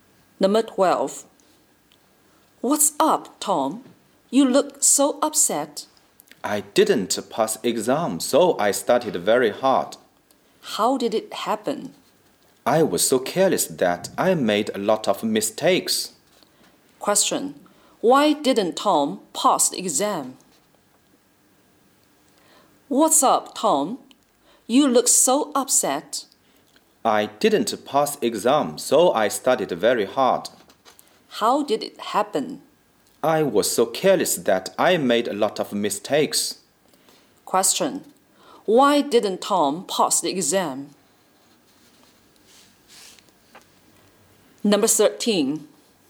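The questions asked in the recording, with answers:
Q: Why didn't Tom pass the exam?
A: He was careless and made a lot of mistakes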